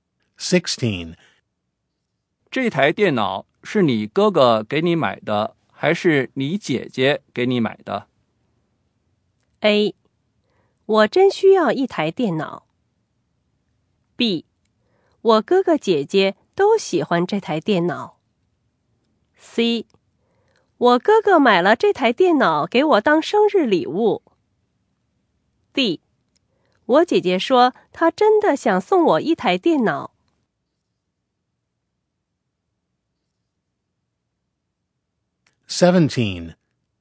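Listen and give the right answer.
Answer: C: 我哥哥买了这台电脑给我当生日礼物。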